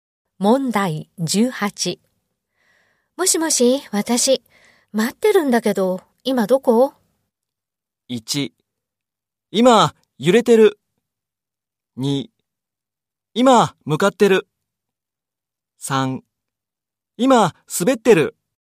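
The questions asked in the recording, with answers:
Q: もしもし、私、待ってるんだけど、今どこ?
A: 2: 今、向かってる。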